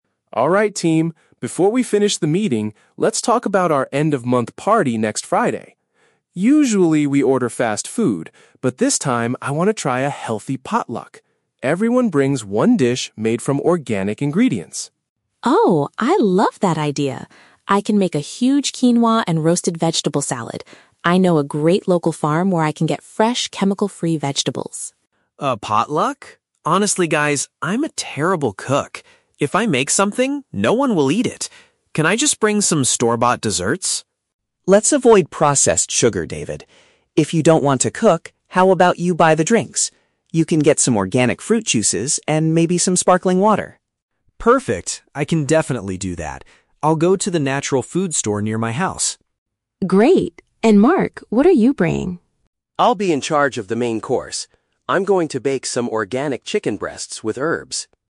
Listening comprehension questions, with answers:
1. What is the main change for this month's office party?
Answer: They are having a meal where staff provide natural food.

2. Why does David hesitate to make a dish for the event?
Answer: He lacks confidence in his culinary skills.

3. What will Mark's contribution to the party be?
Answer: He will prepare the primary meat dish for the team.

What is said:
Mark: Alright team, before we finish the meeting, let's talk about our end-of-month party next Friday. Usually, we order fast food, but this time I want to try a healthy potluck. Everyone brings one dish made from organic ingredients.
Sarah: Oh, I love that idea! I can make a huge quinoa and roasted vegetable salad. I know a great local farm where I can get fresh, chemical-free vegetables.
David: A potluck? Honestly, guys, I'm a terrible cook. If I make something, no one will eat it. Can I just bring some store-bought desserts?
Mark: Let's avoid processed sugar, David. If you don't want to cook, how about you buy the drinks? You can get some organic fruit juices and maybe some sparkling water.
David: Perfect. I can definitely do that. I'll go to the natural food store near my house.
Sarah: Great! And Mark, what are you bringing?
Mark: I'll be in charge of the main course. I'm going to bake some organic chicken breasts with herbs.